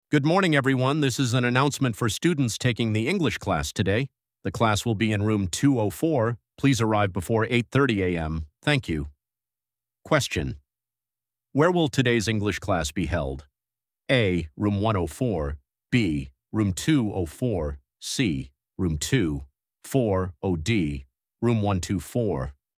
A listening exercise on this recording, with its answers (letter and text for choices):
Where will today's English class be held?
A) Room 104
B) Room 204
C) Room 240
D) Room 124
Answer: B) Room 204

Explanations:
Đây là dạng bài cơ bản của Part 1. Thông tin cần tìm là địa điểm, được nêu trực tiếp trong câu: The class will be in Room 204. Đây là dạng câu hỏi nhận diện thông tin trực tiếp. Người học chỉ cần xác định đúng từ khóa "Room" và nghe chính xác số phòng để lựa chọn đáp án.

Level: B1